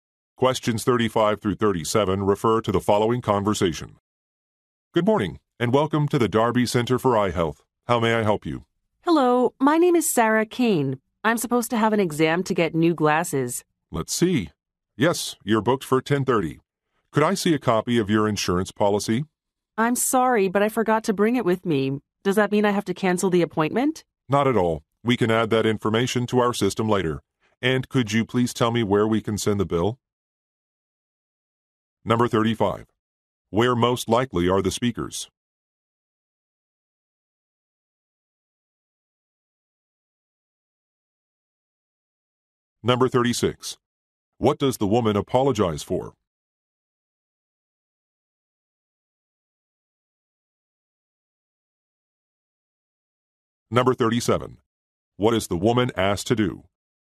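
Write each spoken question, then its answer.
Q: Where most likely are the speakers?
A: At an eye clinic

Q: What does the woman apologize for?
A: Forgetting her insurance policy

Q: What is the woman asked to do?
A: Give an address for the bill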